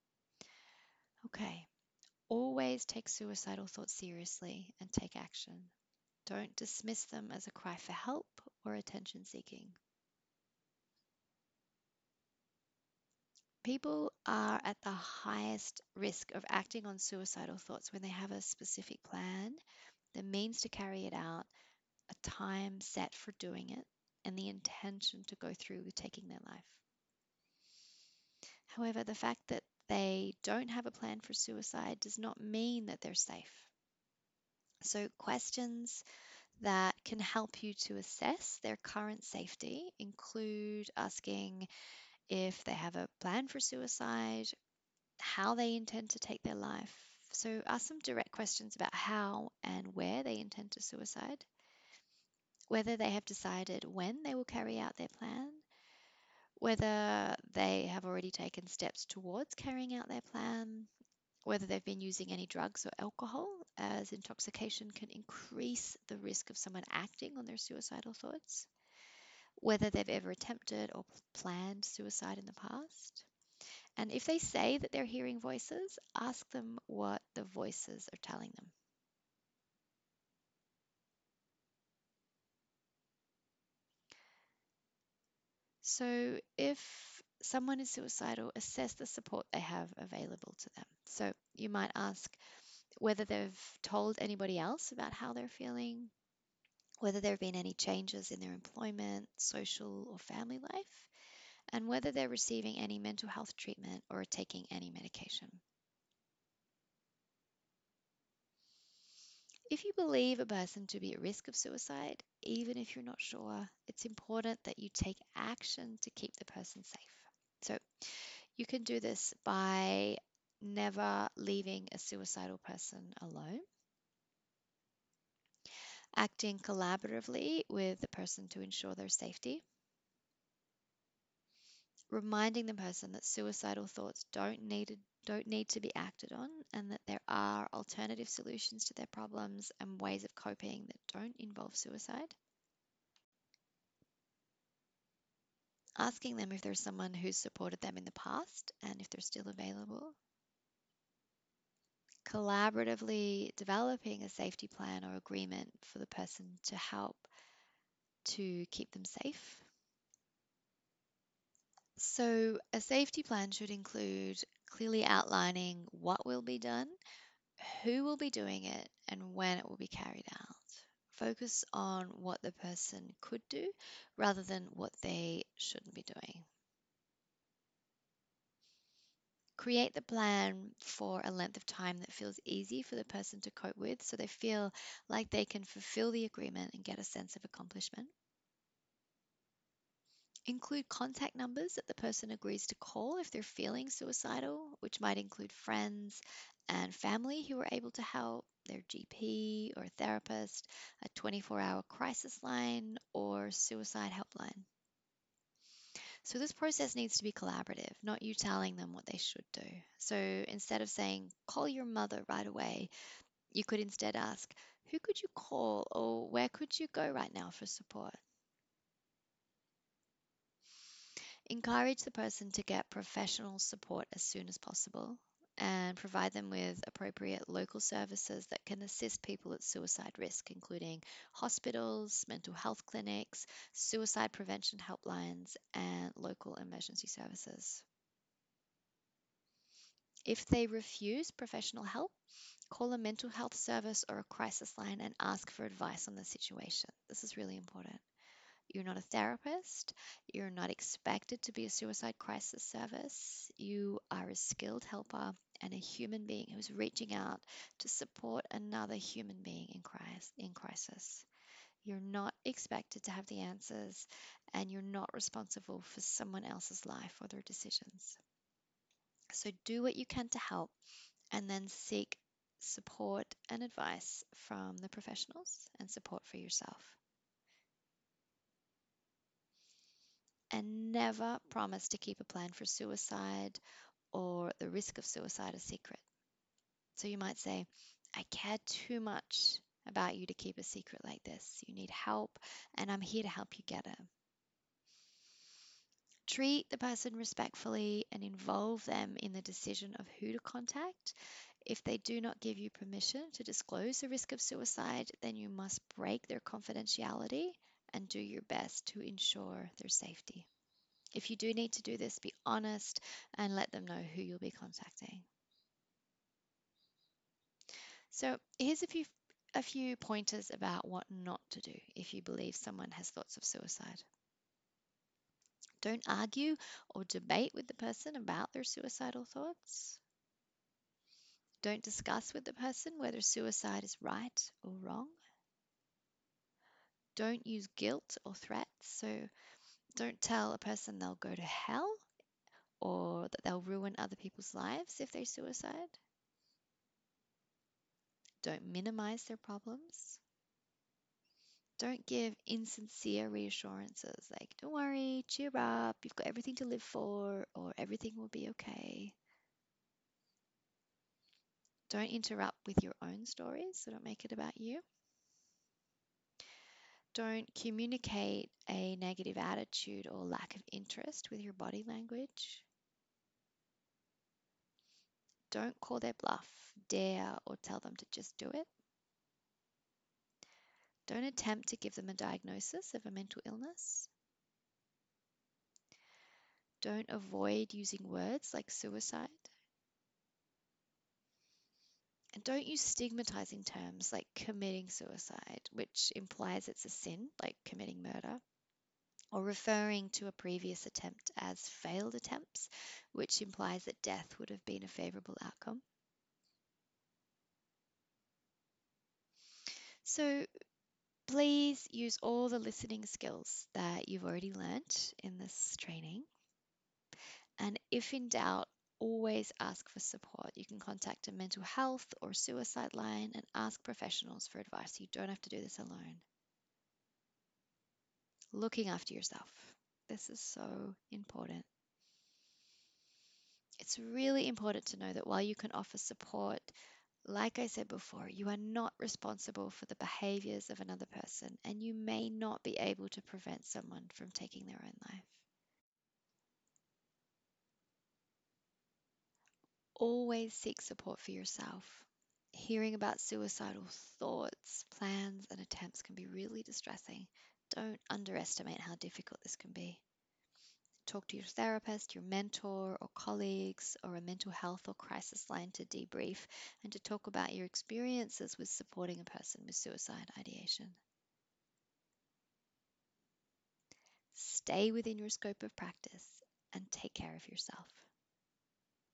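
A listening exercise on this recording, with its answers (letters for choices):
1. What questions could you ask someone who has disclosed suicidal thoughts?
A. Questions to assess their safety, including if they have a plan, how they intend to take their life, if they have decided to go ahead, if they have taken any steps towards carrying out their plan, if they are using drugs or alcohol and if they have ever attempted or planned suicide in the past.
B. Questions about the morality of suicide, including if they realise that suicide is a sin and will ruin the lives of people around them.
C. Questions about their support, including if they've told anyone else about the suicidal thoughts, if they have some who can support them after class, and if they have a therapist or professional support team.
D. Answers 1 and 3.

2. How could you care for yourself after a student discloses suicide ideation?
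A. Stay within your scope of practice, and remind yourself that you are not responsible for the behaviours of another person. While you can offer support you may not be able to prevent someone from taking their life.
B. Seek support for yourself. Talk to your therapist, mentor, colleague or a mental health crisis line.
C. Take the time to tune into what you need, and do that.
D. All of the above.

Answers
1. D
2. D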